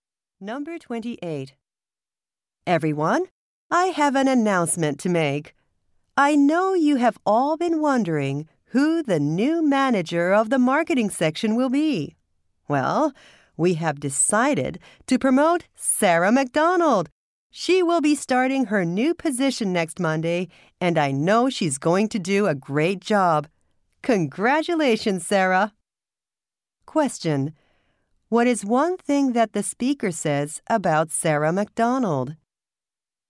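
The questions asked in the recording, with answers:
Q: What is one thing that the speaker says about Sarah McDonald?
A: She will be the new manager of the marketing section.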